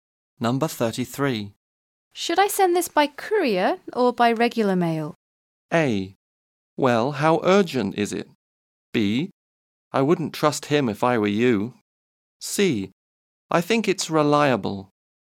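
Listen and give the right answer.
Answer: A: Well, how urgent is it?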